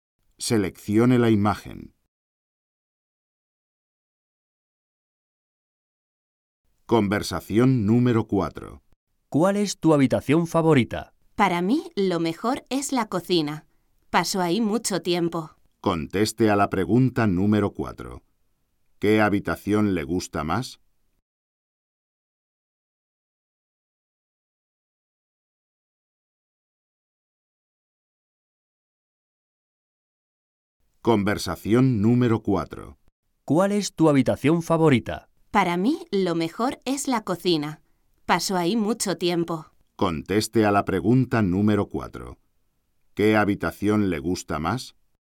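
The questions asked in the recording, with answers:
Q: ¿Qué habitación le gusta más?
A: La cocina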